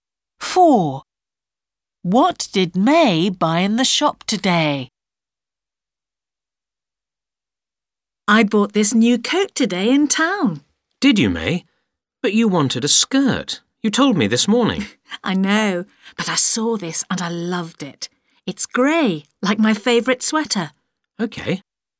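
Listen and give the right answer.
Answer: A coat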